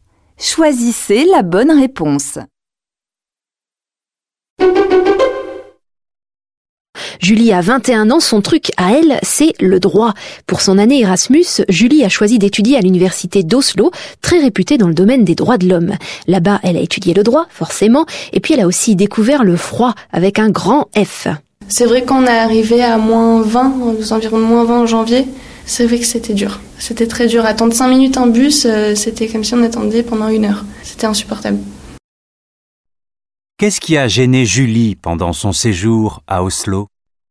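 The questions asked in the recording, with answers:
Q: Qu'est-ce qui a gêné Julie pendant son séjour à Oslo ?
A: Le froid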